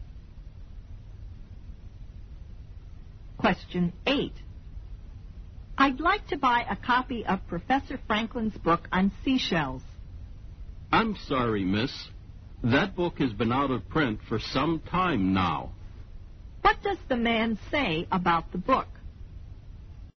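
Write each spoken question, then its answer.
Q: What does the man say about the book?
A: It has been out of print for some time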